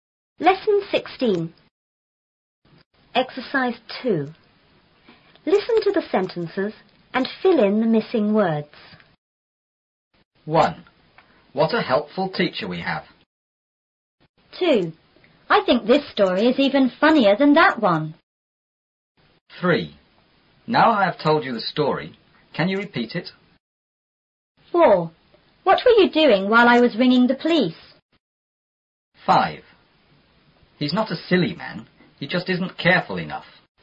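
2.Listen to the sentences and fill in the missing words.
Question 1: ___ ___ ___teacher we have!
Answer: What a helpful

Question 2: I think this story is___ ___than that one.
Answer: even funnier

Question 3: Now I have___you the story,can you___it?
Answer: told; repeat

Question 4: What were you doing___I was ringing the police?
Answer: while

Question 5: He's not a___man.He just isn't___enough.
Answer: silly; careful

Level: 初中英语广州版4B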